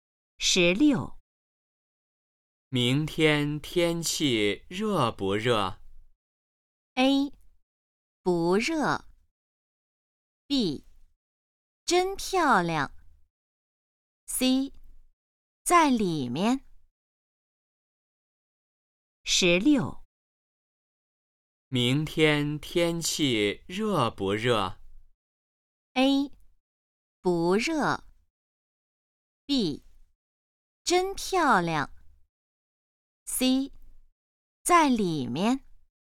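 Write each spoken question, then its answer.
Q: 明天天气热不热?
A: A: 不热。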